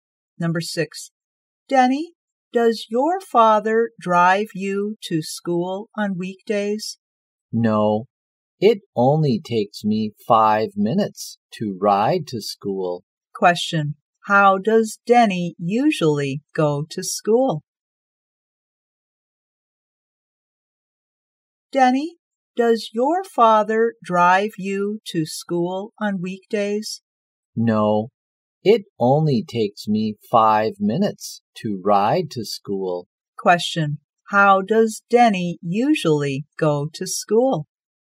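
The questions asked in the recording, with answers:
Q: Question. How does Denny usually go to school?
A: By bike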